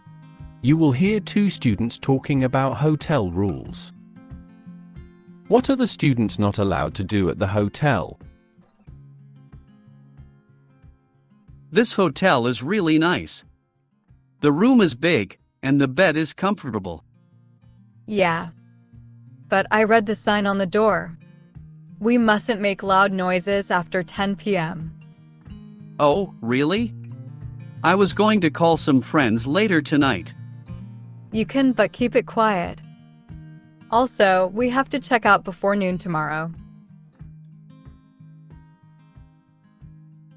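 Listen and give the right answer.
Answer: Make loud noises after 10 p.m.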